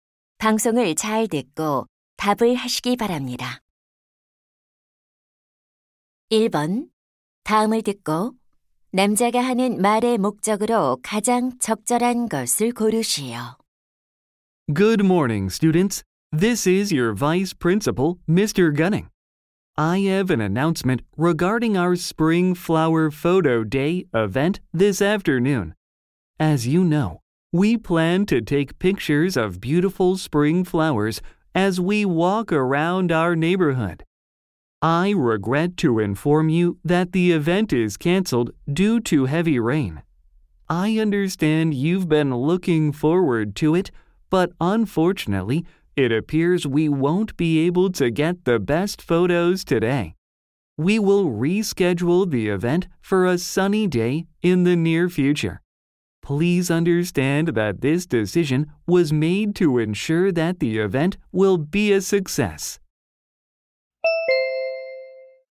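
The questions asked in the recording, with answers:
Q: 다음을 듣고 남자가 하는 말의 목적으로 가장 적절한 것을 고르시오.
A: 폭우로 봄꽃 사진 촬영 행사가 취소되었음을 알리려고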